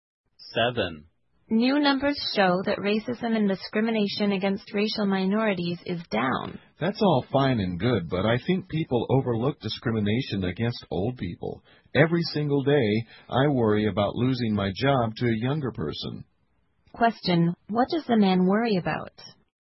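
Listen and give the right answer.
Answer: Losing his job to a younger person.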